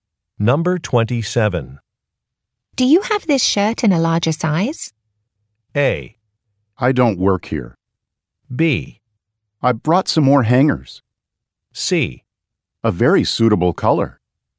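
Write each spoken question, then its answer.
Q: Do you have this shirt in a larger size?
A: A: I don't work here.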